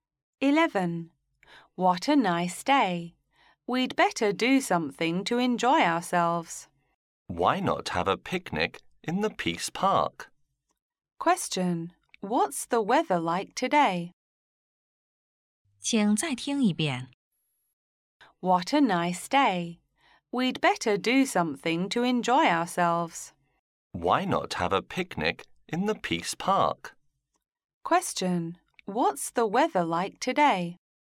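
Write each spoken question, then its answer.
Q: What's the weather like today?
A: It's nice/fine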